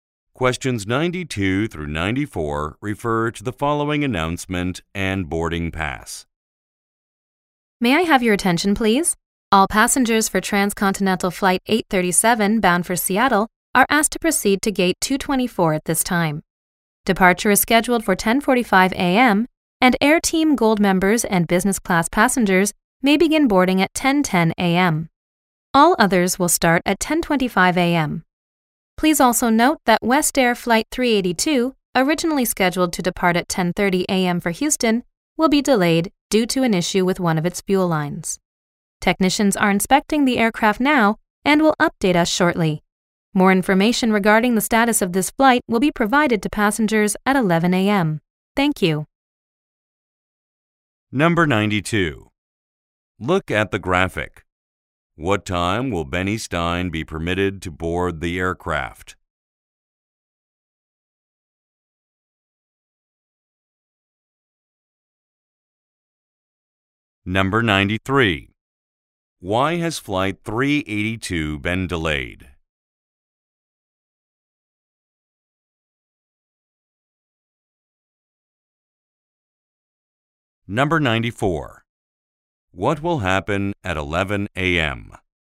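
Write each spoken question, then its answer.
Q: Why has Flight 382 been delayed?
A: An issue with one of its fuel lines

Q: What will happen at 11 a.m.?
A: Passengers will get more information about the flight's status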